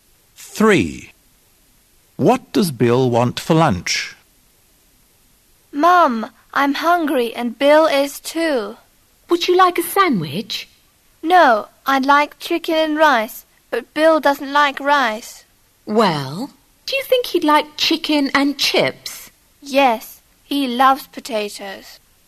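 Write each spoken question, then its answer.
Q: What does Bill want for lunch?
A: Chicken and chips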